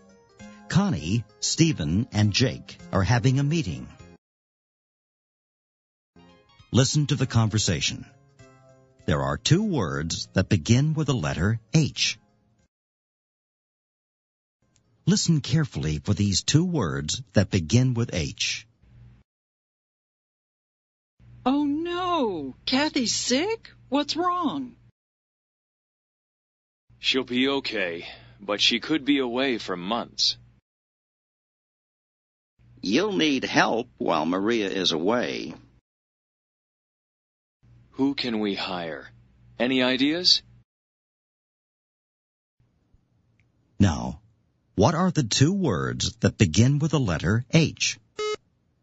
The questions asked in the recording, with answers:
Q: Now, what are the two words that begin with the letter H?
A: The words are help and hire.